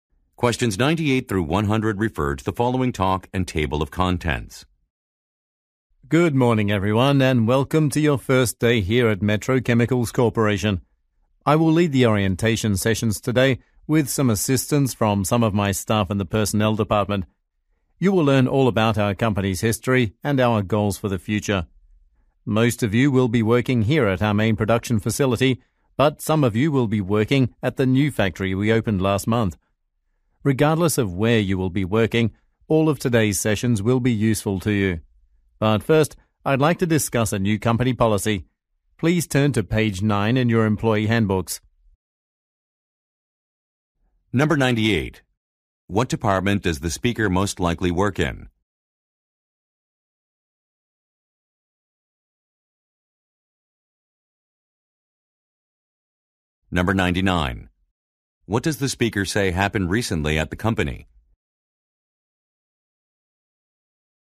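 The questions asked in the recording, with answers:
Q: What department does the speaker most likely work in?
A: Personnel

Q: What does the speaker say happened recently at the company?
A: A new factory opened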